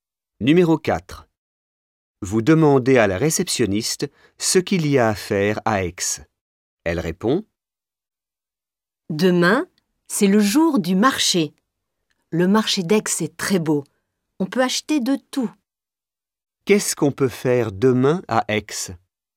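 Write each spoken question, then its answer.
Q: Qu'est-ce qu'on peut faire demain à Aix?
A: Aller au marché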